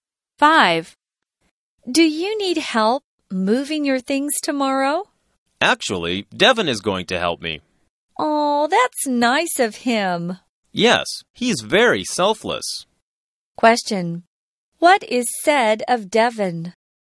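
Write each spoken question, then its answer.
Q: What is said of Devin?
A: He is very selfless and will help move things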